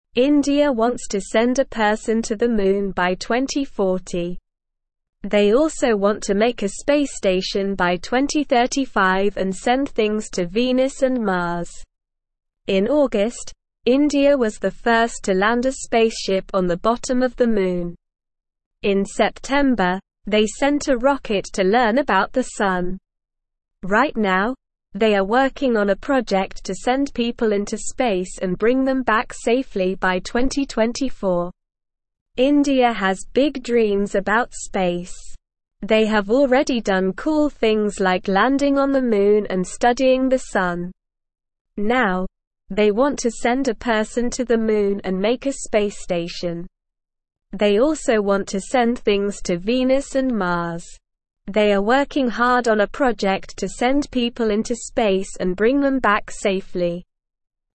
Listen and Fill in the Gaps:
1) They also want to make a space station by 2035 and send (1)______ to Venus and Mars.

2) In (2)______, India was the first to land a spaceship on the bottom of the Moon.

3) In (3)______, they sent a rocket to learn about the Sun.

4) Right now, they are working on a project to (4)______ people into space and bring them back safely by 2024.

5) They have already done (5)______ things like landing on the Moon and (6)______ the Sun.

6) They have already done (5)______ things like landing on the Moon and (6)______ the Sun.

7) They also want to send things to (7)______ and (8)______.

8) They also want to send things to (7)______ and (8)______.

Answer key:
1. things
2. August
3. September
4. send
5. cool
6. studying
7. Venus
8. Mars

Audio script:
India wants to send a person to the Moon by 2040. They also want to make a space station by 2035 and send things to Venus and Mars. In August, India was the first to land a spaceship on the bottom of the Moon. In September, they sent a rocket to learn about the Sun. Right now, they are working on a project to send people into space and bring them back safely by 2024.
India has big dreams about space. They have already done cool things like landing on the Moon and studying the Sun.

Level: Level 1